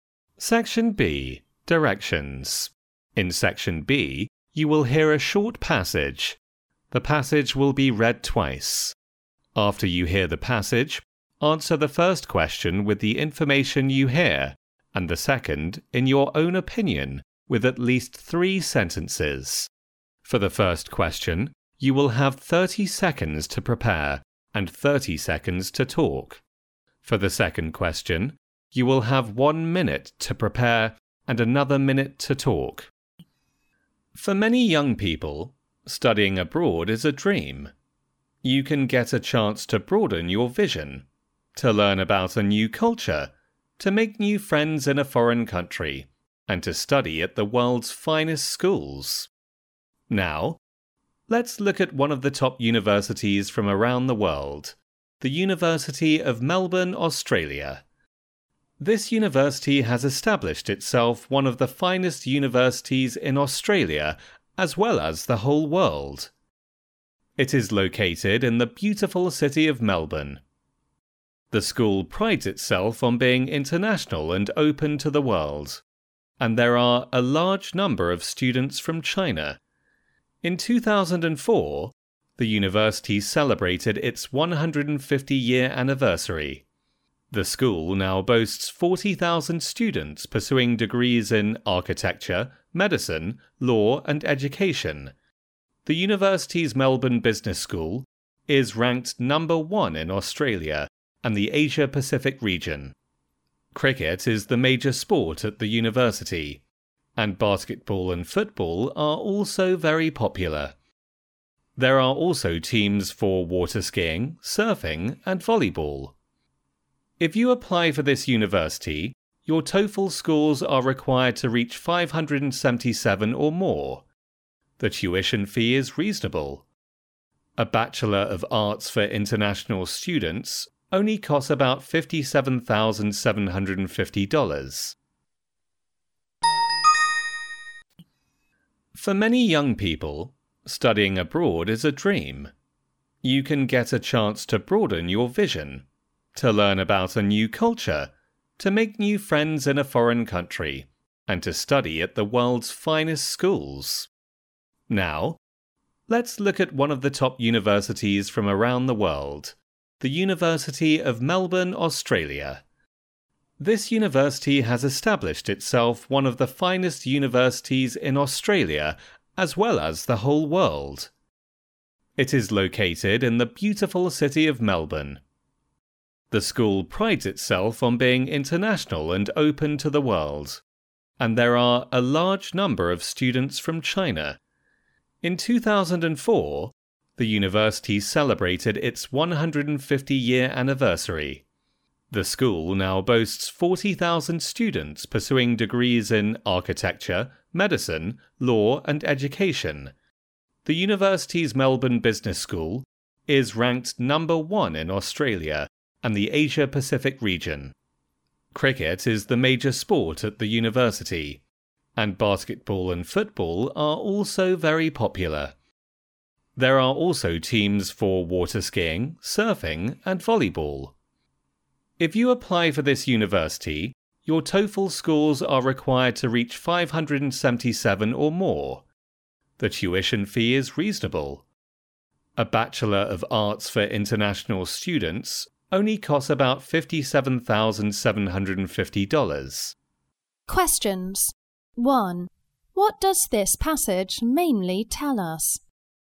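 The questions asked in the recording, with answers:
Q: What does this passage mainly tell us?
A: It introduces the University of Melbourne, Australia, as a good place to study abroad.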